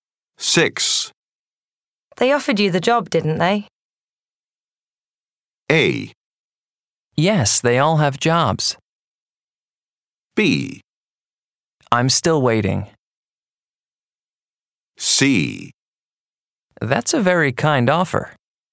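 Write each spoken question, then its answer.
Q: They offered you the job, didn't they?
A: B: I'm still waiting.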